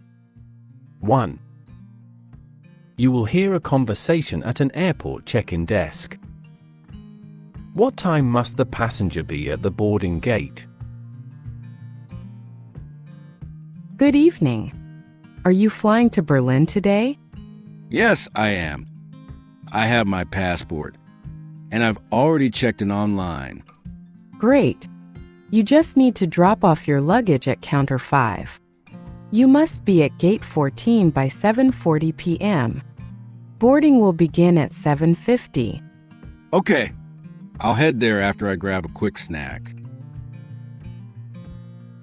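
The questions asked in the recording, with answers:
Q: What time must the passenger be at the boarding gate?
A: 7:40 p.m.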